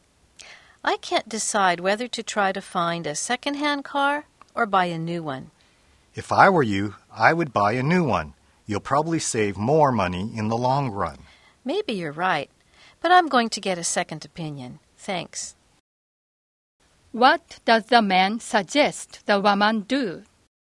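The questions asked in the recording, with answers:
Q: What does the man suggest the woman do?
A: Buy a new car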